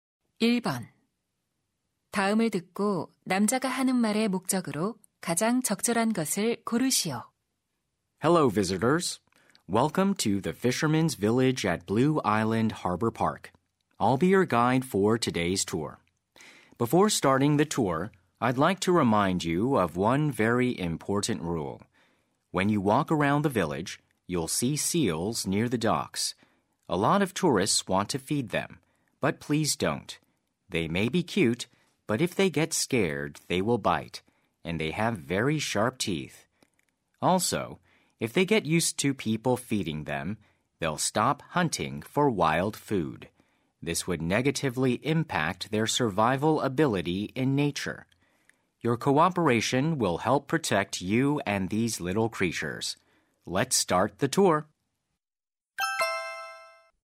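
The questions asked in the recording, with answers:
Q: 다음을 듣고 남자가 하는 말의 목적으로 가장 적절한 것을 고르시오.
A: 물개에게 먹이를 주지 말 것을 당부하려고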